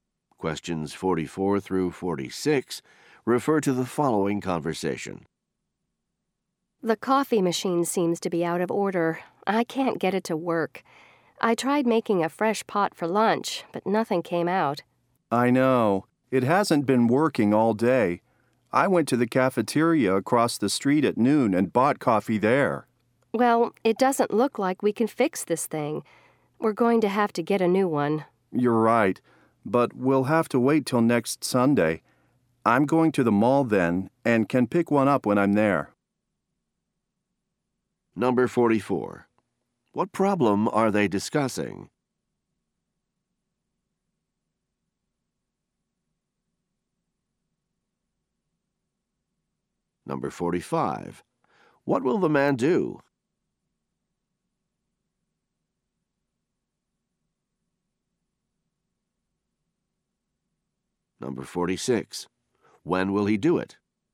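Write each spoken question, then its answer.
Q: What problem are they discussing?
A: The coffee machine is broken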